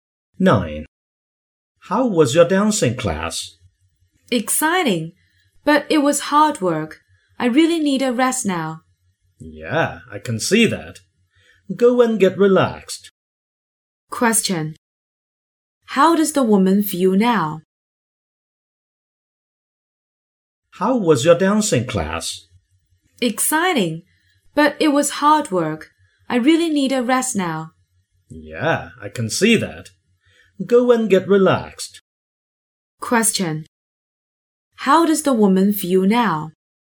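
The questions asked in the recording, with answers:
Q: Question.How does the woman feel now?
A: Tired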